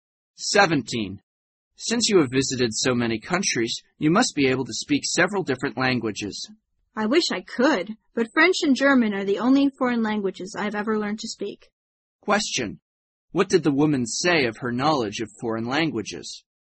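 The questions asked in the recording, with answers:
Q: What did the woman say of her knowledge of foreign languages?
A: She can speak only French and German.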